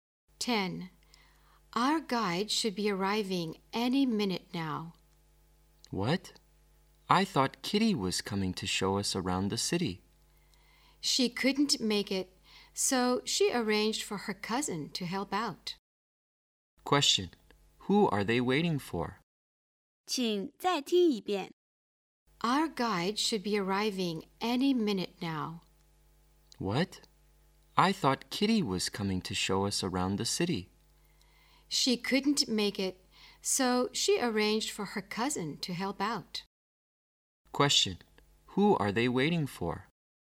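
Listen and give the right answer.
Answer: Kitty's cousin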